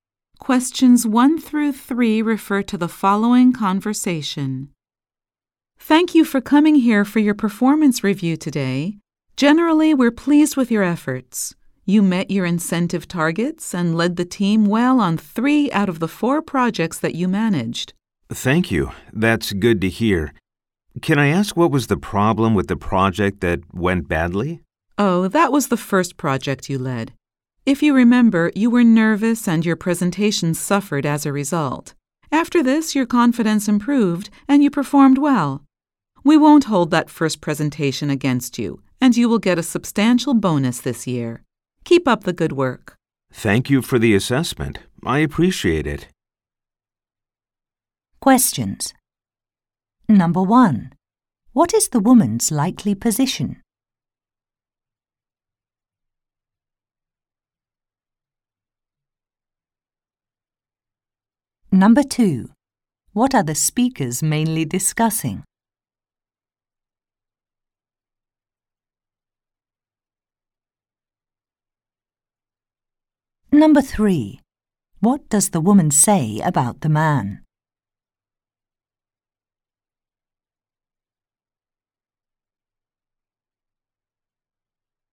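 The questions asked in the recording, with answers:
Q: What are the speakers mainly discussing?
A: The man's performance review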